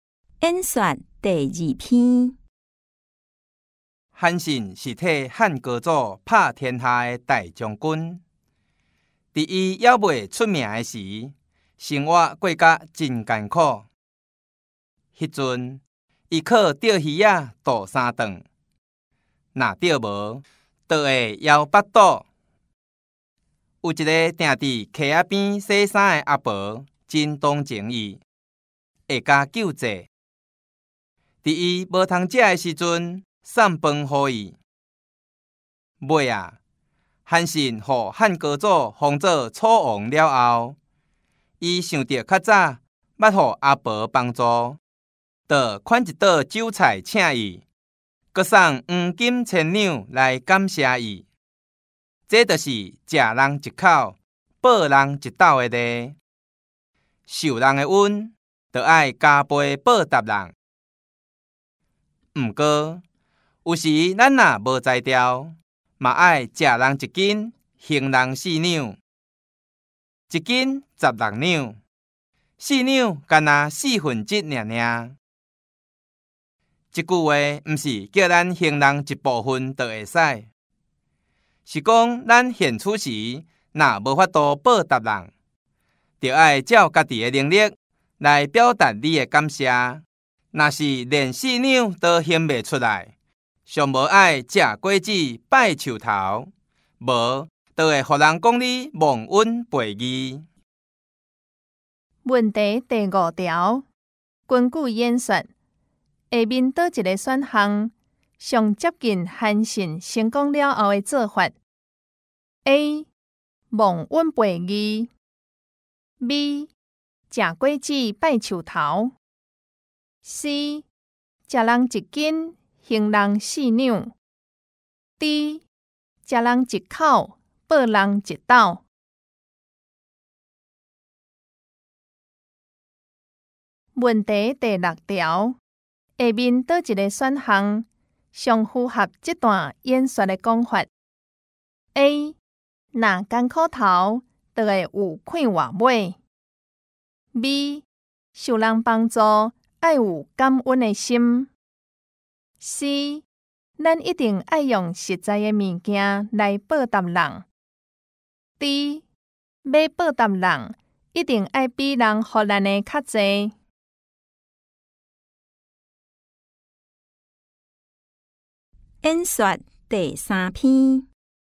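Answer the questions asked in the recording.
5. D: 吃人一口,报人一道
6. B: 受人帮助爱有感恩的心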